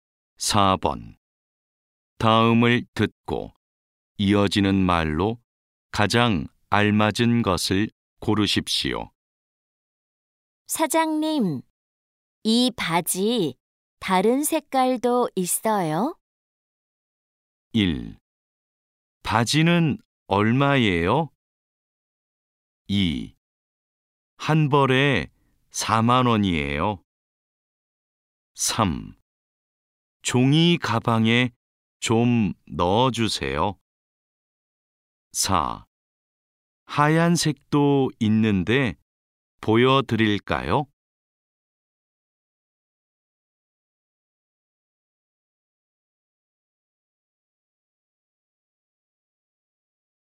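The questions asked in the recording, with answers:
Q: 다음을 듣고 이어지는 말로 가장 알맞은 것을 고르십시오.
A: 4: 하얀색도 있는데 보여드릴까요?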